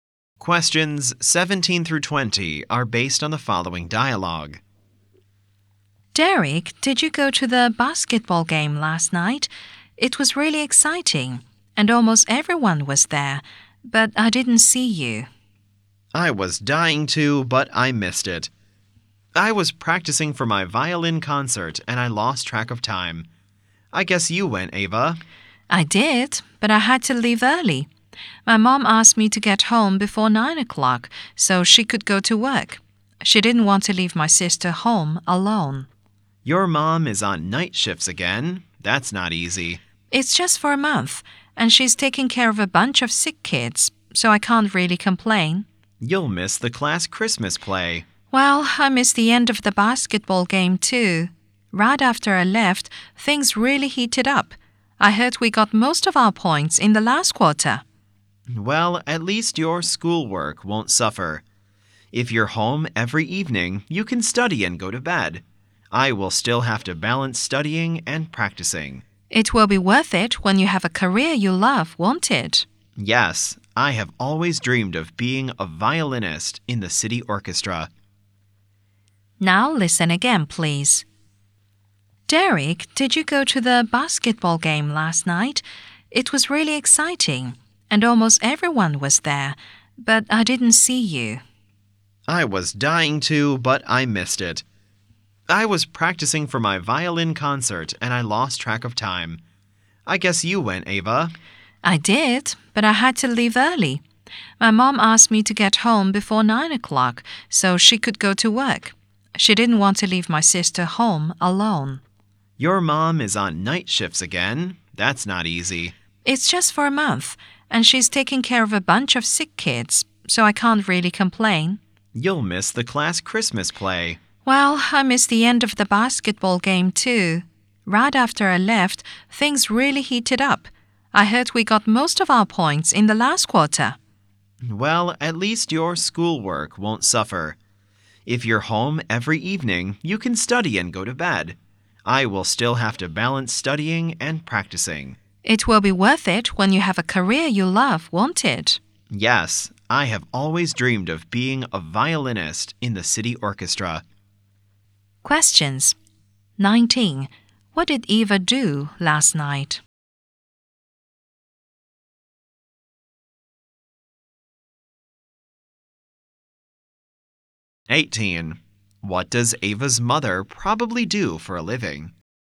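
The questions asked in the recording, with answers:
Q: What did Eva do last night?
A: She went to the basketball game but left early.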